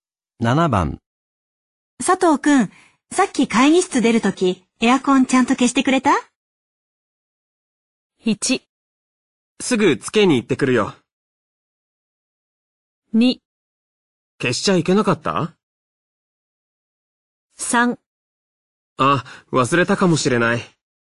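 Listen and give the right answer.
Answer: 3: あ、忘れたかもしれない。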